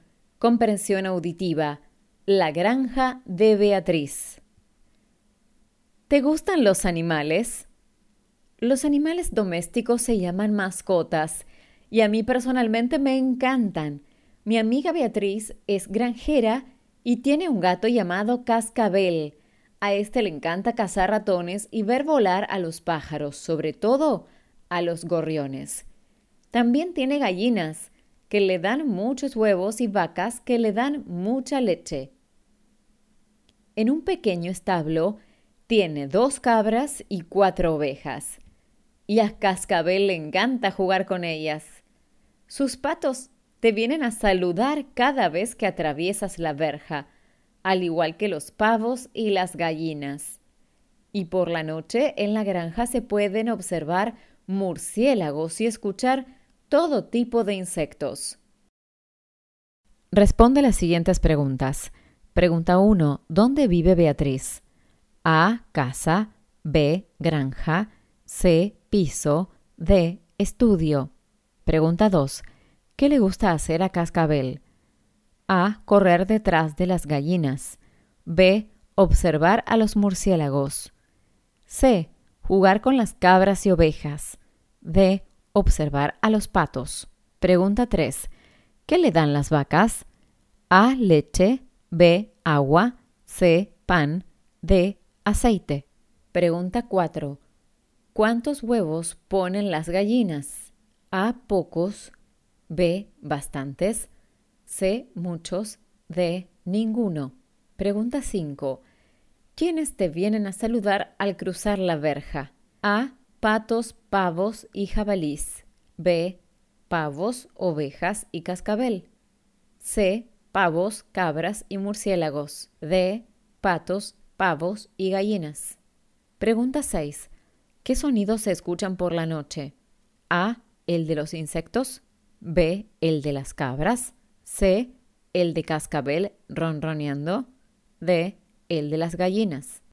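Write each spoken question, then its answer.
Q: ¿Dónde vive Beatriz?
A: B: Granja

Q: ¿Qué le gusta hacer a Cascabel?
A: C: Jugar con las cabras y ovejas

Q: ¿Qué le dan las vacas?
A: A: Leche

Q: ¿Cuántos huevos ponen las gallinas?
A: C: Muchos

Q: ¿Quiénes te vienen a saludar al cruzar la verja?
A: D: Patos, pavos y gallinas

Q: ¿Qué sonidos se escuchan por la noche?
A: A: El de los insectos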